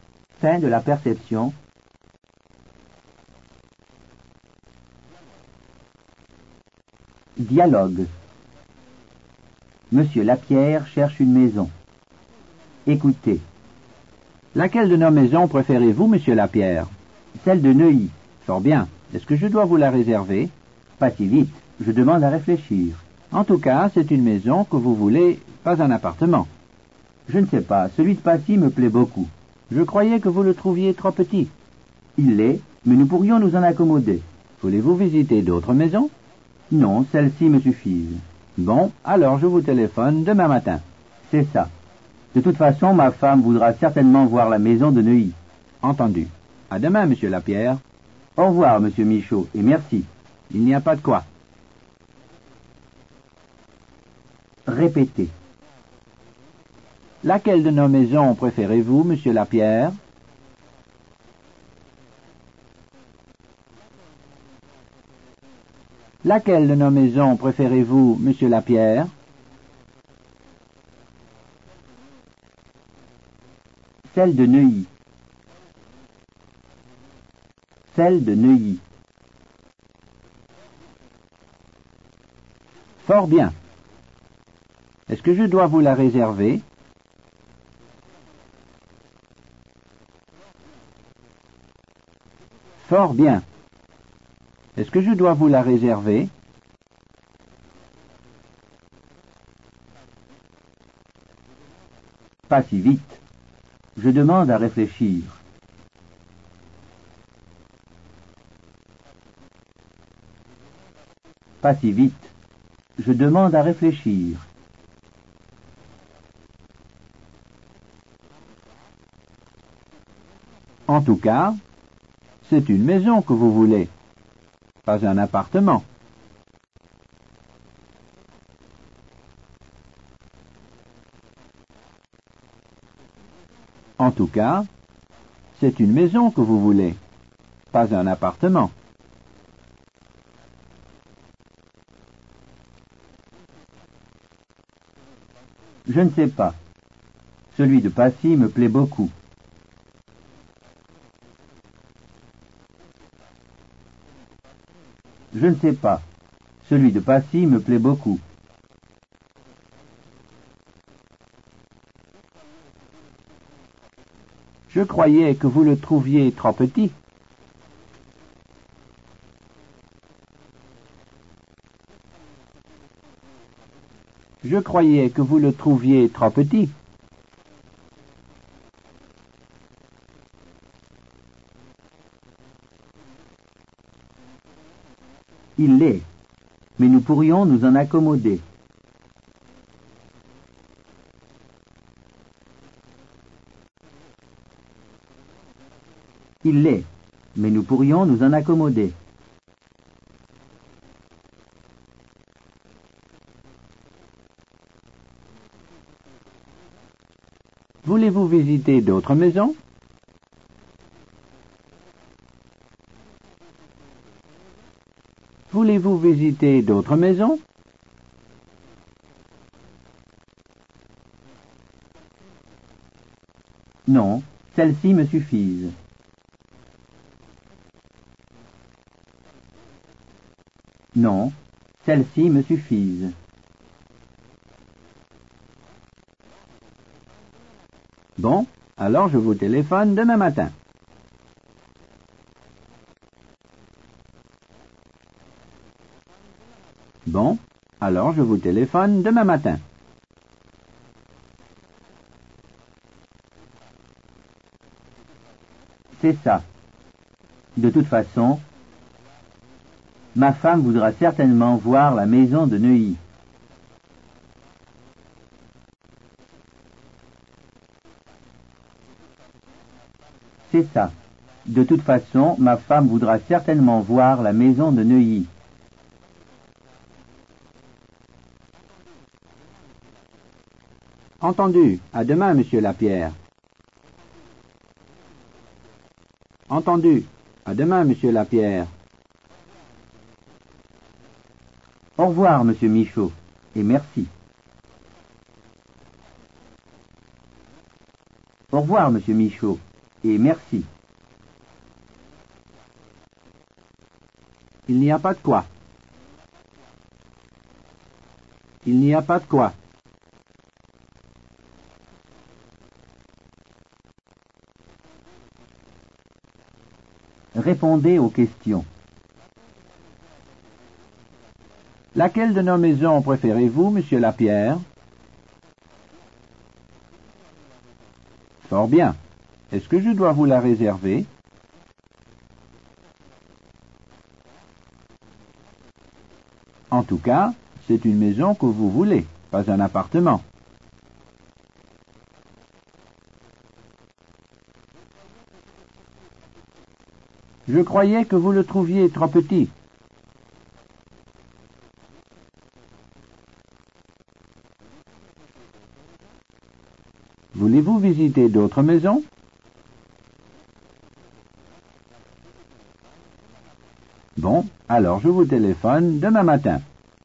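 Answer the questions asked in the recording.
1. Celle de Neuilly.
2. Pas si vite. Je demande à réfléchir.
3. Je ne sais pas. Celui de Passy me plaît beaucoup.
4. Il l'est, mais nous pourrions nous en accommoder.
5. Non, celles-ci me suffisent.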